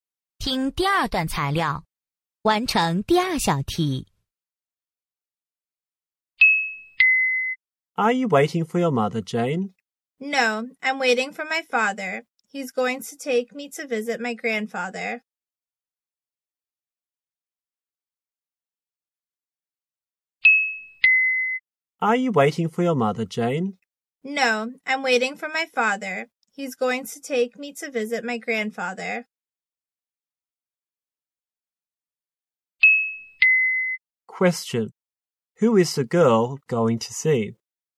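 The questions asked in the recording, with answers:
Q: Question. Who is the girl going to see?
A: Her grandfather.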